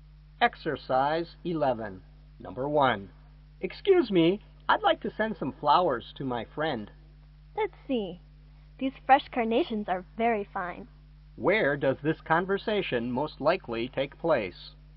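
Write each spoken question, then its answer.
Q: Where does this conversation most likely take place?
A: At a flower shop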